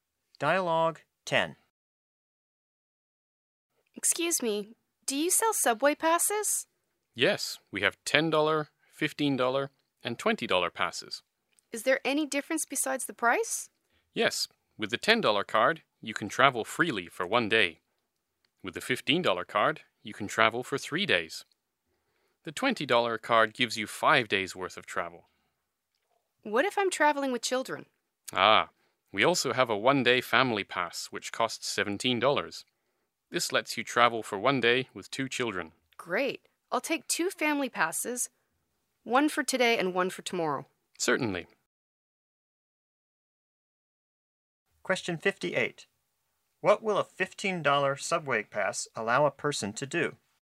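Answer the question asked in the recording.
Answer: Travel freely for 3 days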